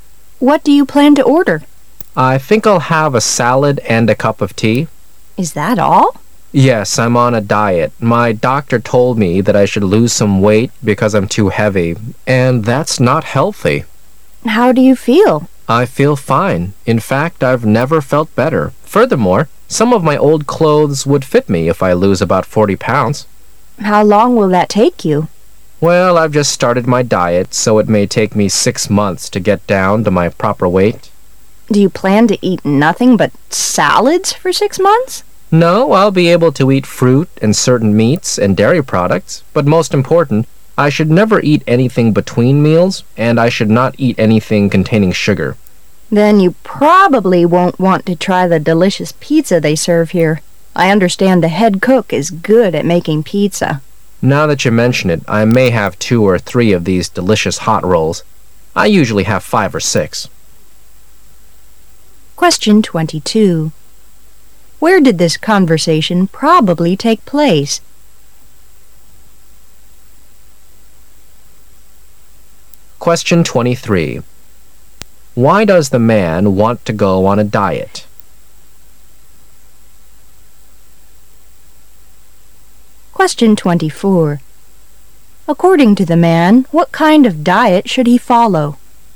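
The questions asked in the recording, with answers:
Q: Where did this conversation probably take place?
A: In a restaurant

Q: Why does the man want to go on a diet?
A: His doctor told him he is too heavy, which is unhealthy

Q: According to the man, what kind of diet should he follow?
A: Salads, fruit, certain meats and dairy; no snacks between meals and nothing with sugar

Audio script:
[解析] 22-25 W: What do you plan to order? M: I think I'll have a salad and a cup of tea. W: Is that all? M: Yes, I'm on a diet, my doctor told me that I should lose some weight because I'm too heavy--and that's not healthy. W: How do you feel? M: I feel fine, in fact, I've never felt better. Furthermore, some of my old clothes would fit me if I lose about 40 pounds. W: How long will that take you? M: Well, I've just started my diet, so it may take me six months to get down to my proper weight. W: Do you plan to eat nothing but salads for six months? 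M: No, I'll be able to eat fruit and certain meats and dairy products, but most important, I should never eat anything between meals and I should not eat anything containing sugar. W: Then you probably won't want to try the delicious pizza they serve here, I understand the head cook is good at making pizza. M:Now that you mention it,I may have two or three of these delicious hot rolls,I usually have five or six.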